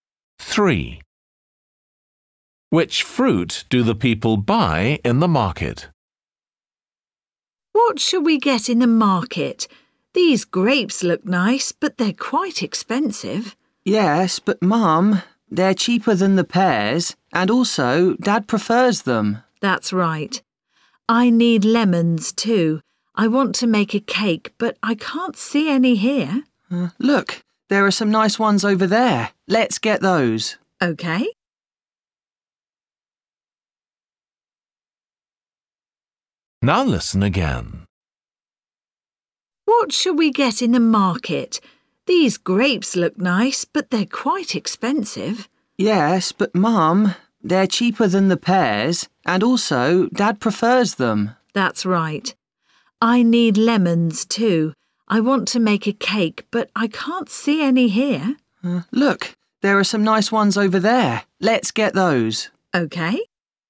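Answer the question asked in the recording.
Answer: grapes and lemons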